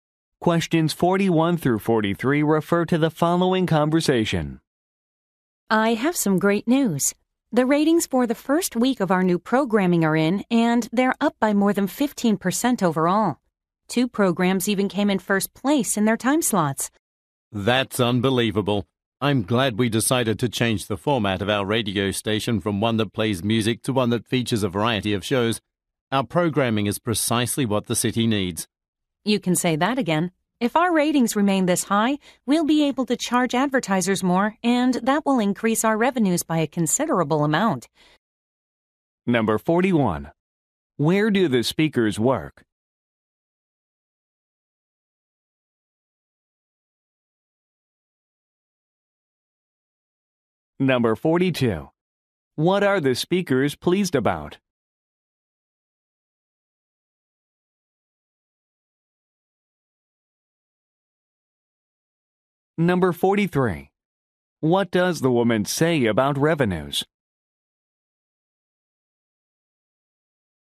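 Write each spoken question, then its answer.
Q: Where do the speakers work?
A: At a radio station

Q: What are the speakers pleased about?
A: Higher ratings for their new programming

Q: What does the woman say about revenues?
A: They could increase considerably if ratings stay high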